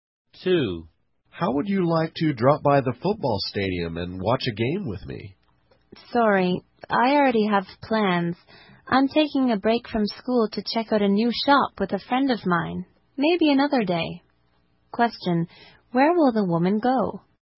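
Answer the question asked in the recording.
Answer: To check out a new shop with a friend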